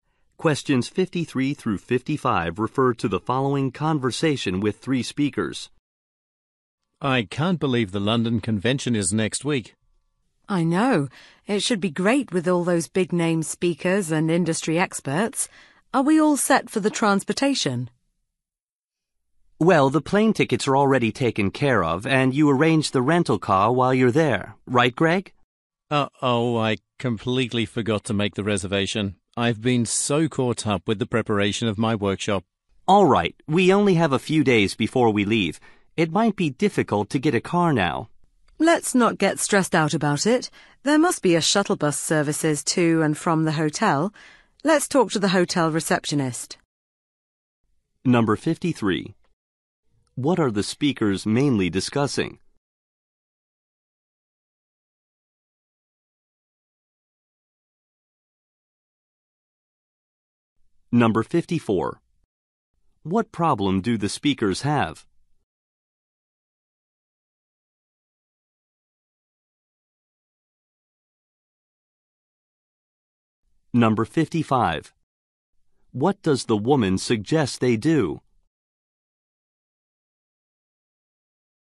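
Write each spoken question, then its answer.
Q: What are the speakers mainly discussing?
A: Transportation for the convention trip

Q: What problem do the speakers have?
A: No rental car has been reserved

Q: What does the woman suggest they do?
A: Ask the hotel receptionist about a shuttle bus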